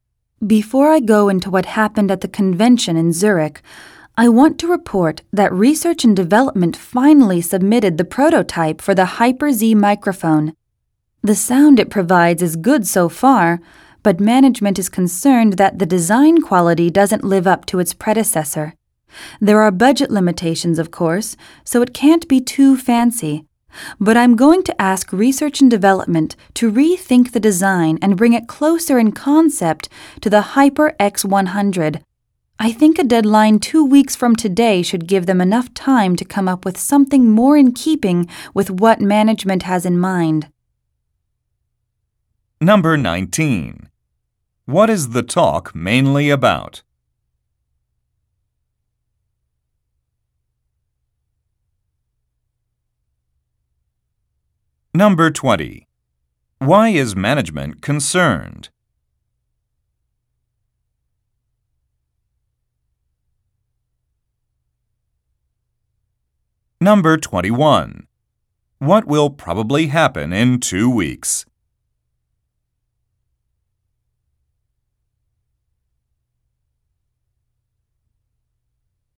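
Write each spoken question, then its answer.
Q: What is the talk mainly about?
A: The prototype of a new microphone (the Hyper-Z)

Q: Why is management concerned?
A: The design quality doesn't live up to its predecessor

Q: What will probably happen in 2 weeks?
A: Research and Development will submit a revised design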